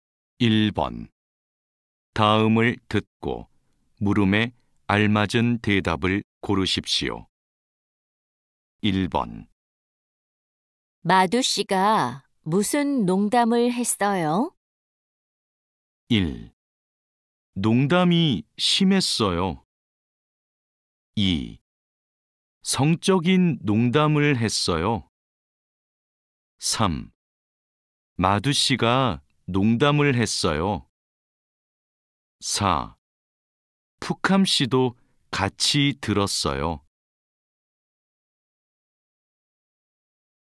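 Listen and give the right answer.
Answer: 2: 성적인 농담을 했어요.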